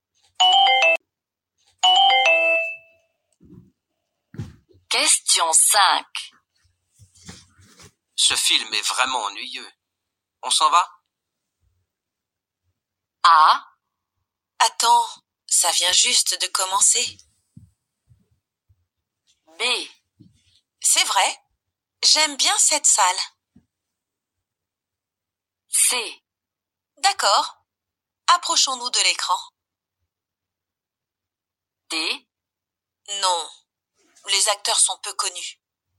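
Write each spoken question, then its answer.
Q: On s'en va?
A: A: Attends, ça vient juste de commencer.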